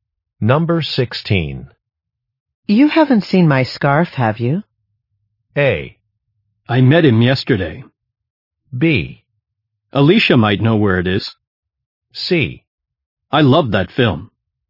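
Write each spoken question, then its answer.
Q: You haven't seen my scarf, have you?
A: B: Alicia might know where it is.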